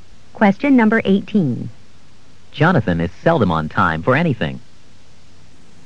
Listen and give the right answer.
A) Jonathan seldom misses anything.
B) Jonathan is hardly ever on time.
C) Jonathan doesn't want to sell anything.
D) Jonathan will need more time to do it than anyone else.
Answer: B) Jonathan is hardly ever on time.

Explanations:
Jonathan is seldom on time for anything.